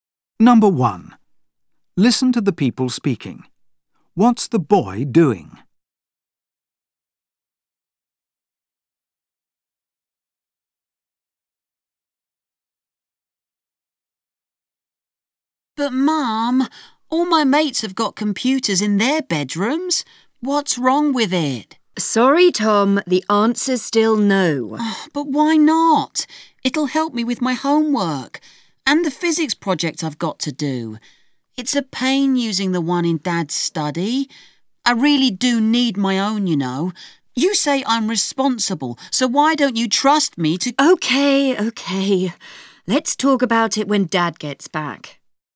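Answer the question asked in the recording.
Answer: Asking his mum to let him have a computer in his bedroom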